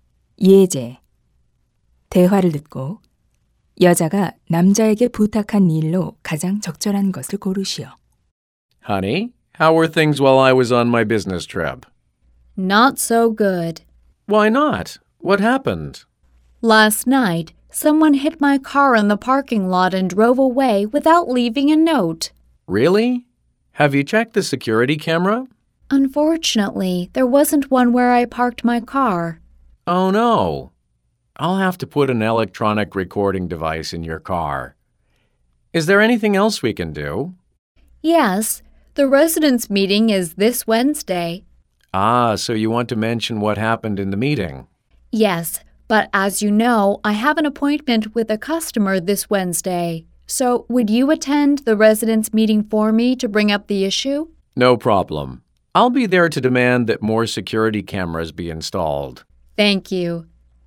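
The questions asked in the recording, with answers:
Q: 대화를 듣고 여자가 남자에게 부탁한 일로 가장 적절한 것을 고르시오.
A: 주민 회의에 대신 참석해서 문제 제기하기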